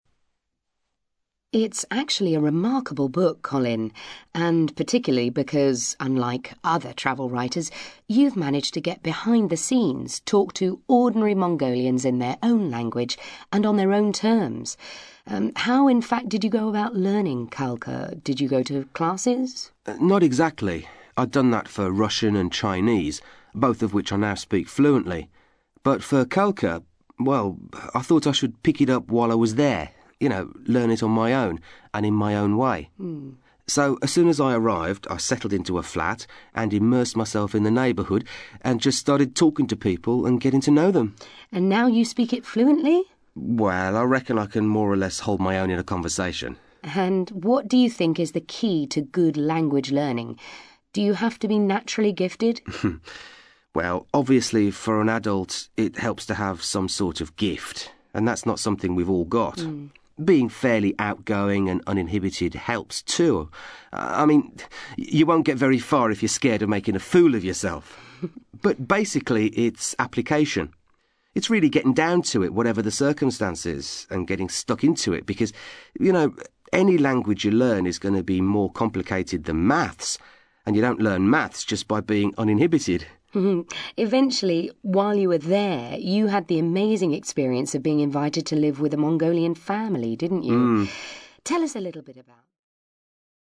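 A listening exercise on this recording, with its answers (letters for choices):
You are going to hear an interview on a travel programme with a writer who has been to Mongolia. For questions 5-6, choose the answer (A, B or C) which fits best according to what you hear.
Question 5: How did Colin first start learning Khalkha?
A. He taught himself before starting his journey.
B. He took lessons with a teacher in London.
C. He learnt it while he was in the country.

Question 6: Colin thinks that adults wanting to learn a new language must...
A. have a talent for language learning.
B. be prepared to work hard.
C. be ready to take risks.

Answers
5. C
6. B

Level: CPE Proficiency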